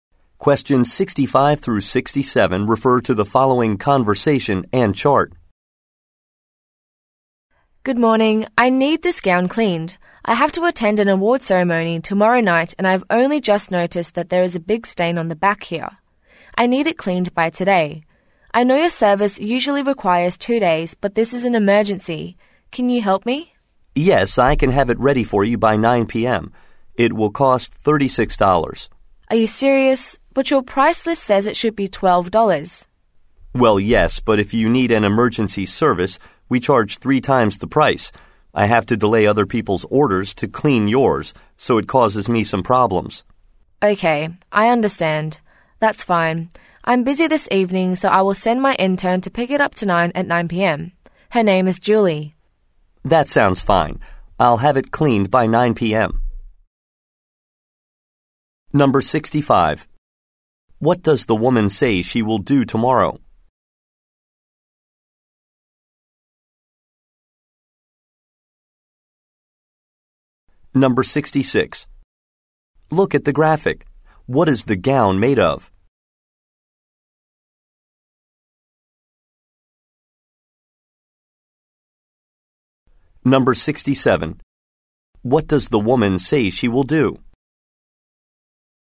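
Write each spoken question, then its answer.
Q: What does the woman say she will do tomorrow?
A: Attend an award ceremony

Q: What does the woman say she will do?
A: Send her intern to pick up the gown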